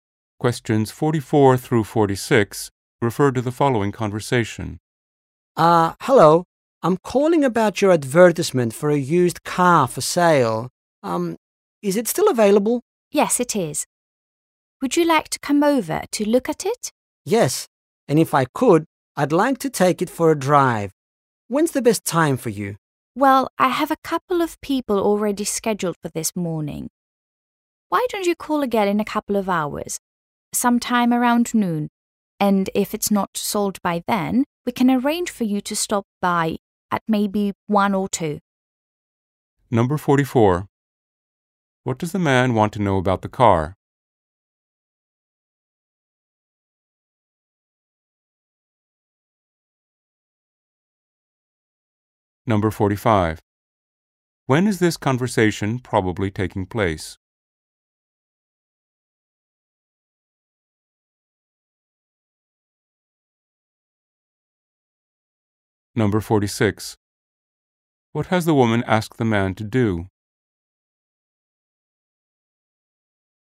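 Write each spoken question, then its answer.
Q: What does the man want to know about the car?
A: Whether it is still available

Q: When is this conversation probably taking place?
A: In the morning

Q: What has the woman asked the man to do?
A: Call again around noon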